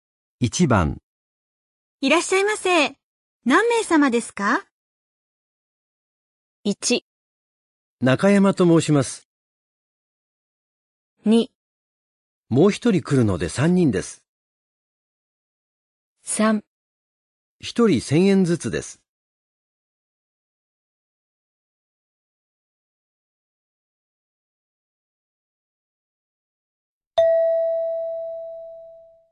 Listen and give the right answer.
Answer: 2

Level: N3 Listening · Test 9